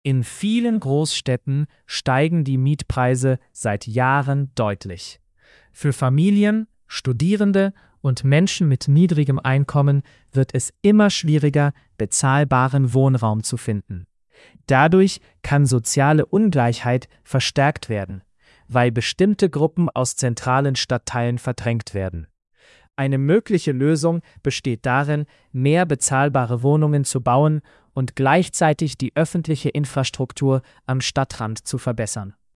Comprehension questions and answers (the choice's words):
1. Welche Entwicklung wird beschrieben?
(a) Mietpreise sinken überall.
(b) Mietpreise steigen in vielen Großstädten.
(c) Niemand möchte in Großstädten wohnen.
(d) Studierende bekommen immer kostenlose Wohnungen.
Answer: Mietpreise steigen in vielen Großstädten.

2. Welche Folge wird genannt?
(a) Soziale Ungleichheit kann verstärkt werden.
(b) Alle Menschen ziehen freiwillig aufs Land.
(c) Die Infrastruktur wird automatisch besser.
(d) Wohnungen werden immer größer.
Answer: Soziale Ungleichheit kann verstärkt werden.

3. Welche Lösung wird vorgeschlagen?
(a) Mehr bezahlbare Wohnungen bauen und Infrastruktur verbessern.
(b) Alle Innenstädte schließen.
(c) Nur teure Wohnungen bauen.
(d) Keine neuen Wohnungen erlauben.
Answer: Mehr bezahlbare Wohnungen bauen und Infrastruktur verbessern.

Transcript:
In vielen Großstädten steigen die Mietpreise seit Jahren deutlich. Für Familien, Studierende und Menschen mit niedrigem Einkommen wird es immer schwieriger, bezahlbaren Wohnraum zu finden. Dadurch kann soziale Ungleichheit verstärkt werden, weil bestimmte Gruppen aus zentralen Stadtteilen verdrängt werden. Eine mögliche Lösung besteht darin, mehr bezahlbare Wohnungen zu bauen und gleichzeitig die öffentliche Infrastruktur am Stadtrand zu verbessern.

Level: C1-Niveau